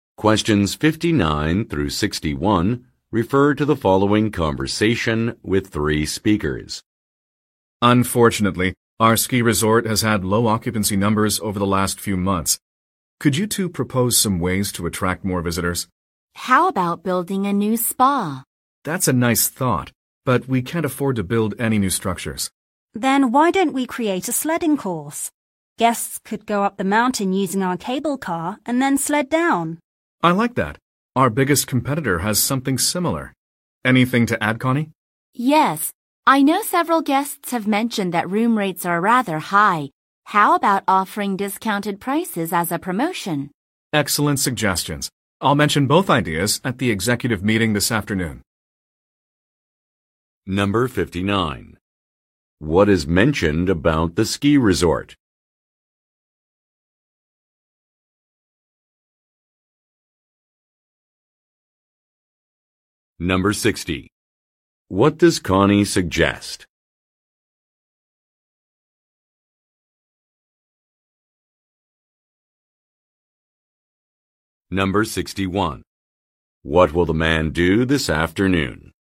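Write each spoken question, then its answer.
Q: What is mentioned about the ski resort?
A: It has had low occupancy numbers in recent months.

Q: What does Connie suggest?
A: Offering discounted room prices as a promotion.

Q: What will the man do this afternoon?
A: Mention the ideas at the executive meeting.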